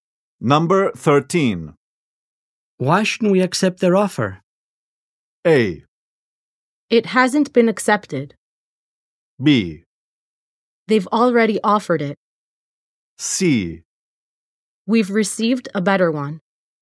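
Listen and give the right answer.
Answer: C: We've received a better one.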